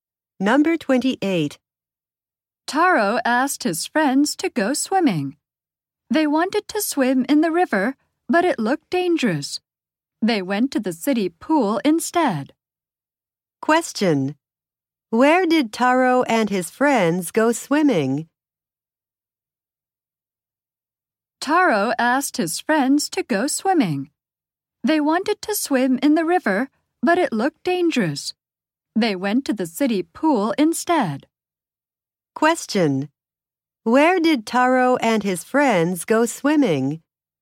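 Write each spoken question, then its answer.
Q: Where did Taro and his friends go swimming?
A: At the city pool.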